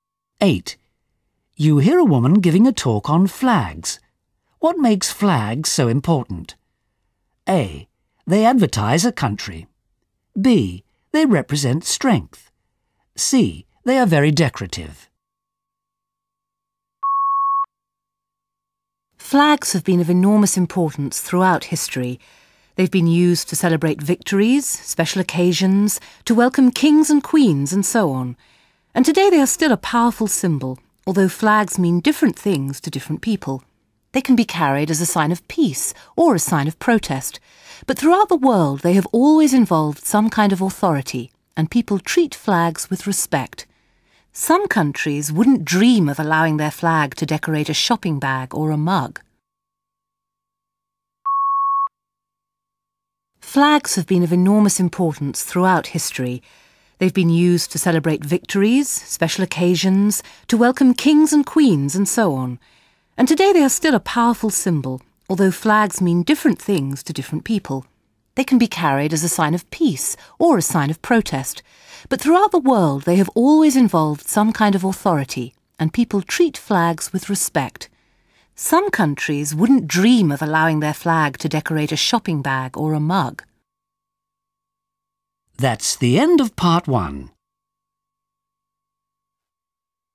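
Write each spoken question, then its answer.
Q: What makes flags so important?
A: B: They represent strength.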